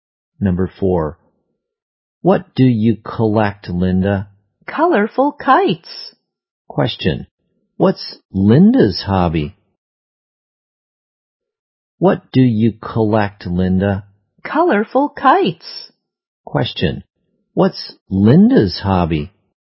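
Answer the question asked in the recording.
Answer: Collecting colorful kites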